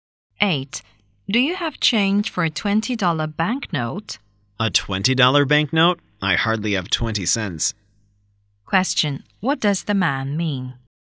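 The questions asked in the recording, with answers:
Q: What does the man mean?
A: He has no change; he has almost no money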